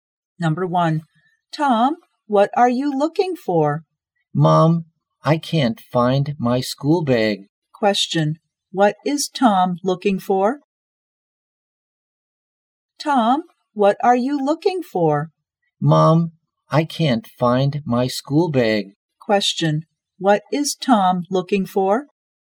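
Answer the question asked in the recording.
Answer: His school bag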